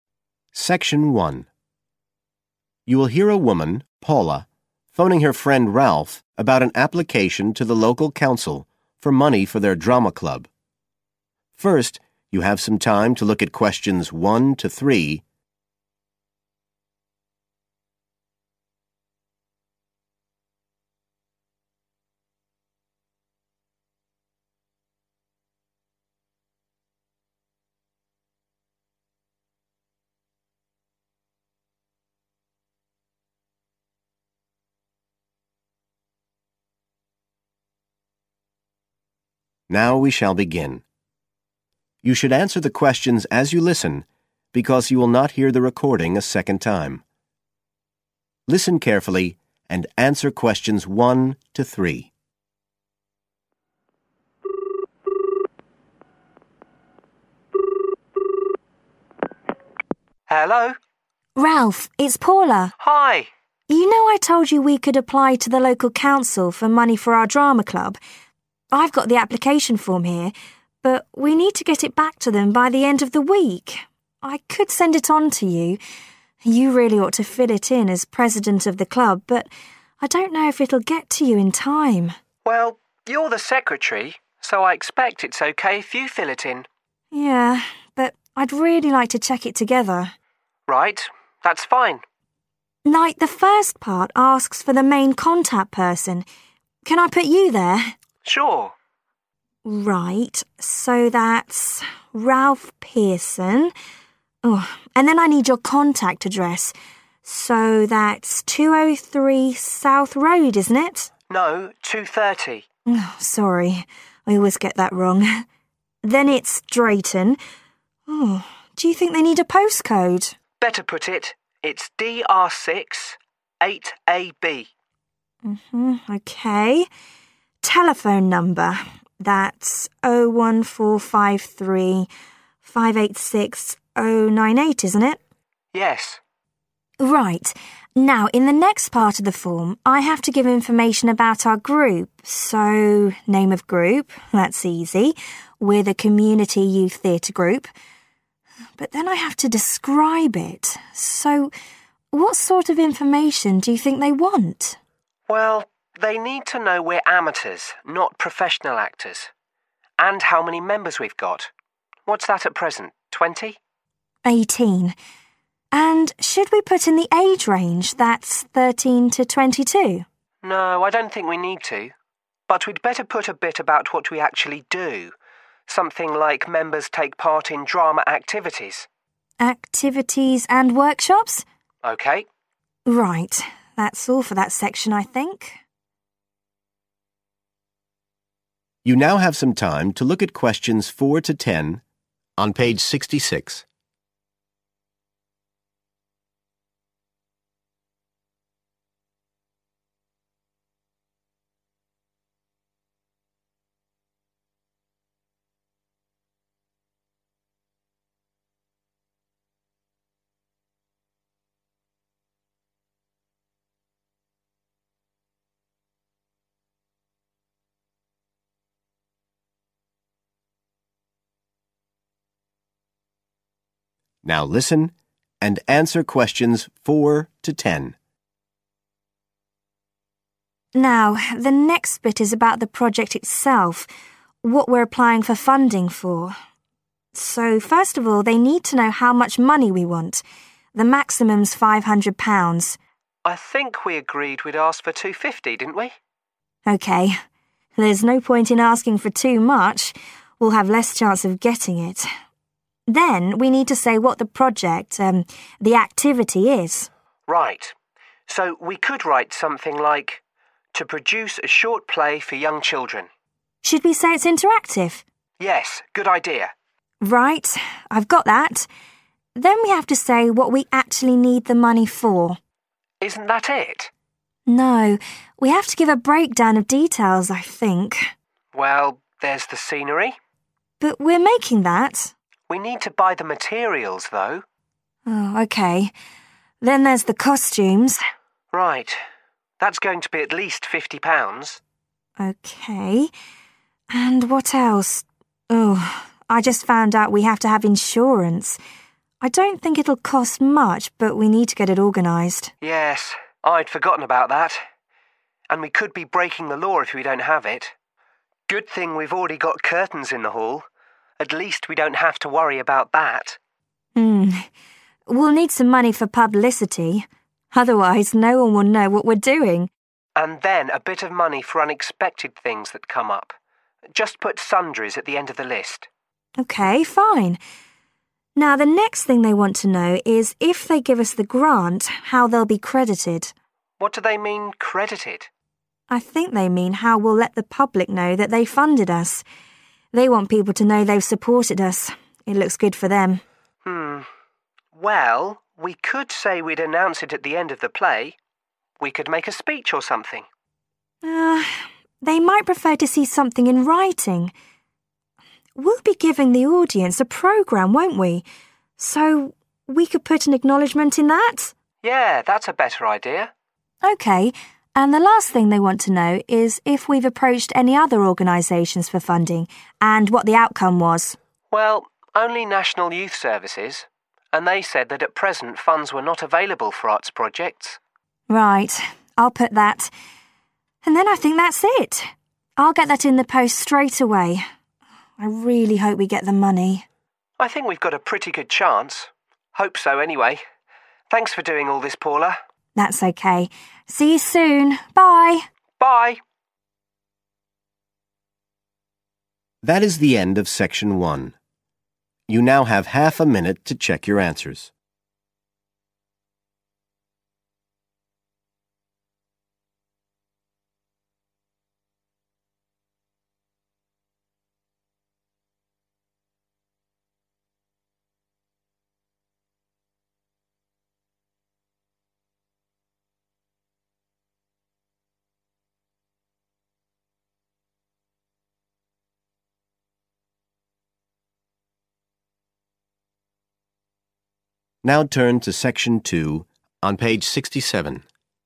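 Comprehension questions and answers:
Complete the form below. Write NO MORE THAN THREE WORDS AND/OR A NUMBER for each answer.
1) Contact address: 1................ Drayton DR6 8AB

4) Amount of money requested:4...............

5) Description of project: to produce a short 5.............. play for young children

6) 6................... for scenery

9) How source of funding will be credited: acknowledged in the 9................. given to the audience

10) Other organisations approached for funding (and outcome): National Youth Services – money was 10..............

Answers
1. 230 South Road
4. £250
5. interactive
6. materials
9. programme
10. not available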